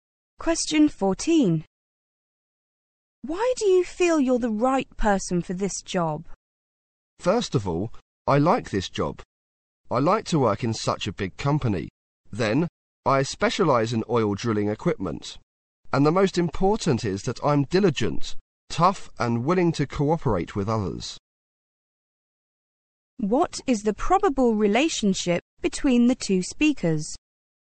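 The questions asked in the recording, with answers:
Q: What is the probable relationship between the two speakers?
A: Interviewer and job applicant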